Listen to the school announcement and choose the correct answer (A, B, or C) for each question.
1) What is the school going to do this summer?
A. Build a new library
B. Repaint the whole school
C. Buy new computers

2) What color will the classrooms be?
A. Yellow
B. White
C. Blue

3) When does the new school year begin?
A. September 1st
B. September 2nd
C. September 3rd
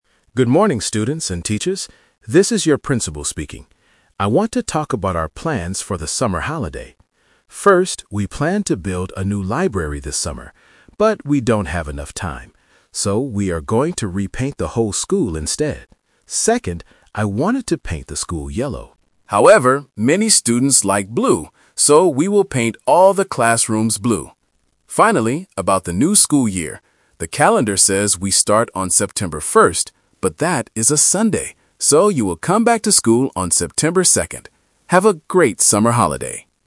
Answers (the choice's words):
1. Repaint the whole school
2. Blue
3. September 2nd

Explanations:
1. The principal mentions they planned to build a new library (The Trap). However, they don't have enough time. He uses "So" to state the final plan: "we are going to repaint the whole school instead." Buying new computers is not mentioned.
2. The principal says he wanted to paint the school yellow (The Trap). However, he changes the color because the students like blue. His final decision is: "we will paint all the classrooms blue." White is not mentioned in the audio.
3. The principal mentions that the calendar says September 1st (The Trap). But he reminds everyone that it is a Sunday. Therefore, he uses "So" to give the correct date: "you will come back to school on September 2nd." September 3rd is not mentioned.

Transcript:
Principal: Good morning, students and teachers. This is your Principal speaking. I want to talk about our plans for the summer holiday. First, we planned to build a new library this summer. But, we don't have enough time. So, we are going to repaint the whole school instead.
Second, I wanted to paint the school yellow. However, many students like blue. So, we will paint all the classrooms blue.
Finally, about the new school year. The calendar says we start on September 1st. But that is a Sunday! So, you will come back to school on September 2nd. Have a great summer holiday!

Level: A2